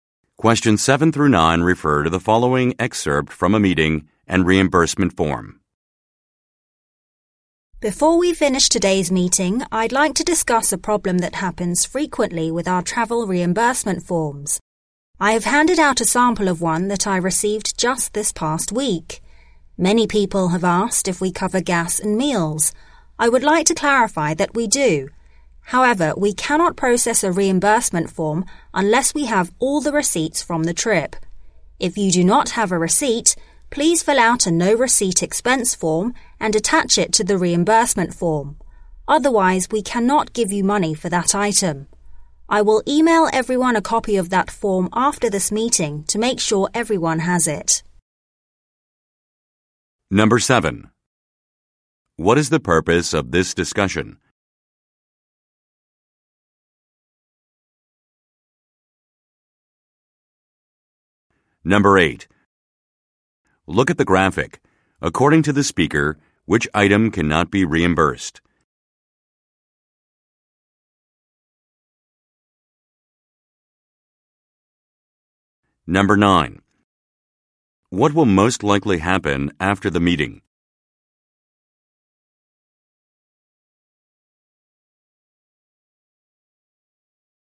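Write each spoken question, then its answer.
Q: What is the purpose of this discussion?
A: To clarify a frequent problem with travel reimbursement forms

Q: What will most likely happen after the meeting?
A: The speaker will email everyone a copy of the no receipt expense form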